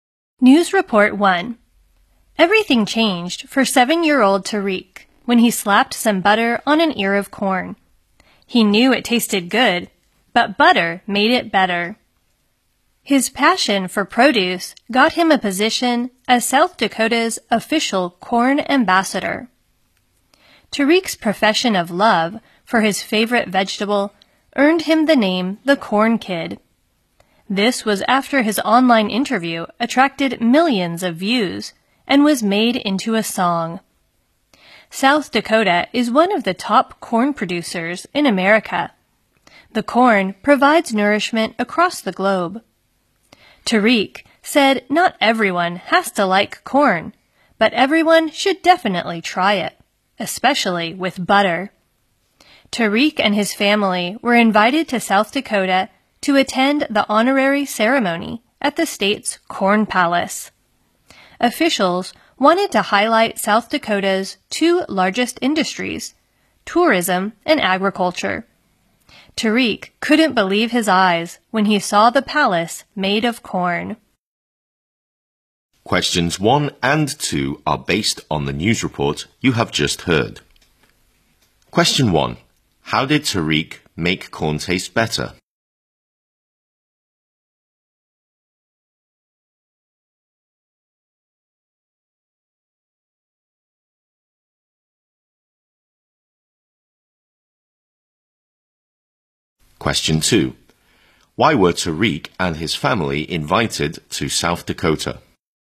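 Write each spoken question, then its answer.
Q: How did Tariq make corn taste better?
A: He put butter on it.

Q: Why were Tariq and his family invited to South Dakota?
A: To attend the ceremony naming him the state's corn ambassador, at the Corn Palace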